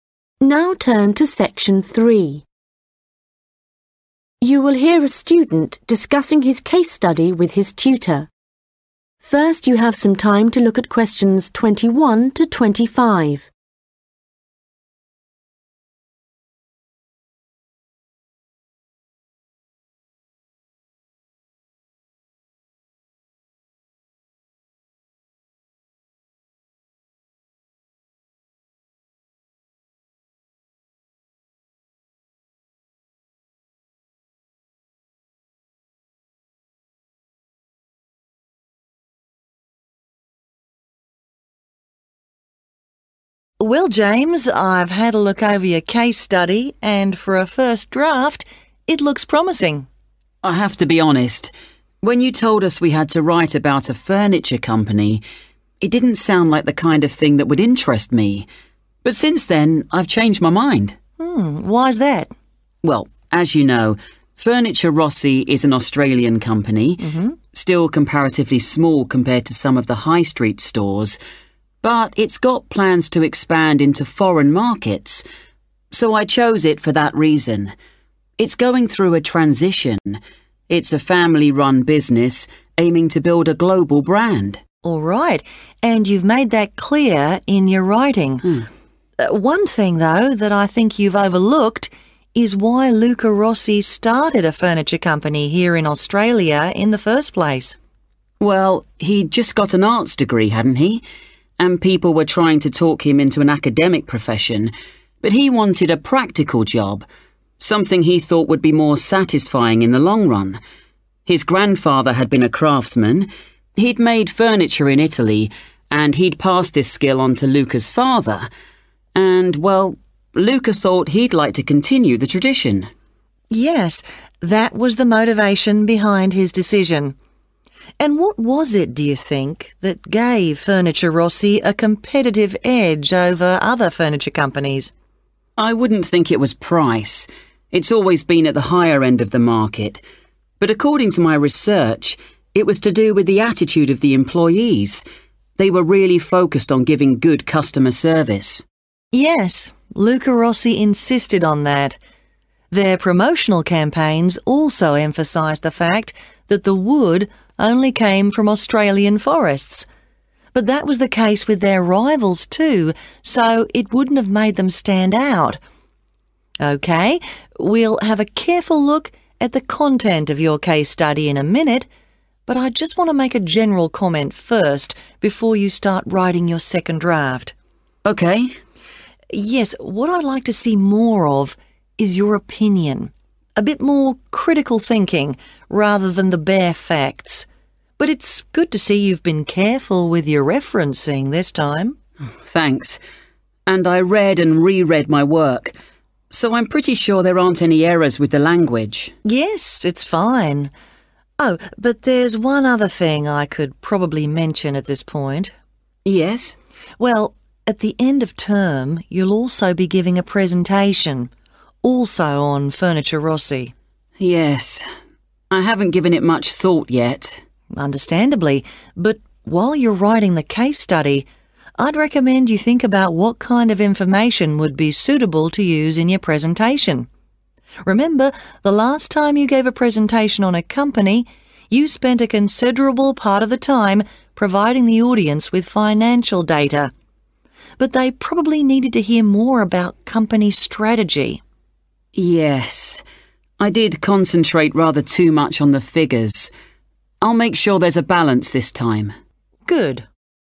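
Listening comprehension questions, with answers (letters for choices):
Questions 21-25 Choose the correct letter, A, B or C.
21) Why has James chosen to do a case study on the company Furniture Rossi?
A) It has enjoyed global success.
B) It is still in a developmental phase.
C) It is an example of a foreign company being rebranded for Australia.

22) According to James, why did Luca Rossi start a furniture company?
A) Furniture-making was already a family occupation.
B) Rossi saw a need for hand-crafted furniture.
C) The work Rossi had done previously was unrewarding.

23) What gave Furniture Rossi a competitive advantage over other furniture companies?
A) its staff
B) its lower prices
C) its locally sourced products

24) What does the tutor recommend James does when writing the second draft of his case study?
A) provide more detailed references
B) check for written accuracy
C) add his own views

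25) What do the tutor and James agree was wrong with James' last presentation?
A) It was too short.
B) It focused too much on statistics.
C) There was not enough interaction with the audience.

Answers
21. B
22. A
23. A
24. C
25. B

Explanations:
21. James: Well, as you know, furniture, Rossi is an Australian company, still comparatively small compared to some of the High Street stores. But it's got plans to expand into foreign markets, so I chose it for that reason. It's going through a transition [Nhưng nó có kế hoạch mở rộng ra thị trường nước ngoài, vì vậy tôi đã chọn nó vì lý do đó. Nó đang trải qua một quá trình chuyển đổi]. It's a family-run business aiming to build a global brand.
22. James: Well, he just got an arts degree, hadn't he? And people were trying to talk him into an academic profession, but he wanted a practical job, something he thought would be more satisfying in the long run. 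His grandfather had been a craftsman. He had made furniture in Italy, and he'd passed this skill onto Luca's father and well Lucas thought he'd like to continue the tradition [Ông nội của anh ấy đã từng là một thợ thủ công. Ông đã làm đồ nội thất ở Ý rồi và đã truyền kỹ năng này cho cha của Luca, và Lucas nghĩ rằng anh ấy muốn tiếp tục truyền thống].
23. James: I wouldn't think it was price. It's always been at the higher end of the market. But according to my research, it was to do with the attitude of the employees. They were really focused on giving good customer service [Nhưng theo nghiên cứu của tôi, đó là do thái độ của nhân viên. Họ đã thực sự tập trung vào việc cung cấp dịch vụ khách hàng tốt].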